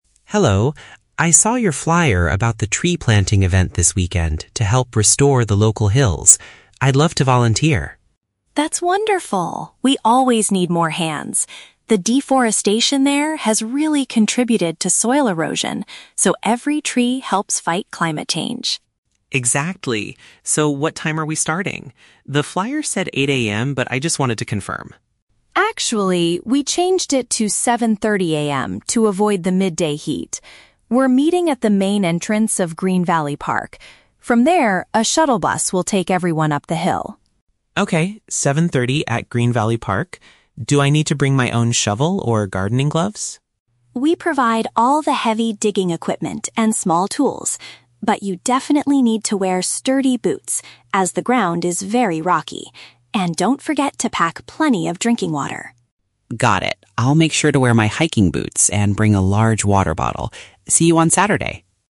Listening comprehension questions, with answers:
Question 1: What is one of the main reasons for the tree-planting project?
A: To repair the environmental damage caused by soil erosion.

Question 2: How will the volunteers reach the actual planting site?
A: They will take a specialized vehicle from the park.

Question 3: What does Rachel tell David he must bring with him?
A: Strong footwear and something to drink.

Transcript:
David: Hello, I saw your flyer about the Tree Planting event this weekend to help restore the local hills. I'd love to volunteer.
Rachel: That's wonderful! We always need more hands. The deforestation there has really contributed to soil erosion, so every tree helps fight climate change.
David: Exactly. So, what time are we starting? The flyer said 8:00 AM, but I just wanted to confirm.
Rachel: Actually, we changed it to 7:30 AM to avoid the midday heat. We're meeting at the main entrance of Green Valley Park. From there, a shuttle bus will take everyone up the hill.
David: Okay, 7:30 at Green Valley Park. Do I need to bring my own shovel or gardening gloves?
Rachel: We provide all the heavy digging equipment and small tools. But you definitely need to wear sturdy boots, as the ground is very rocky. And don't forget to pack plenty of drinking water.
David: Got it. I'll make sure to wear my hiking boots and bring a large water bottle. See you on Saturday!